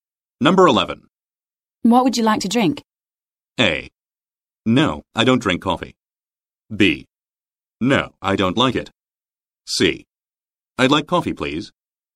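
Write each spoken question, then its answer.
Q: What would you like to drink?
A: C: I'd like coffee, please.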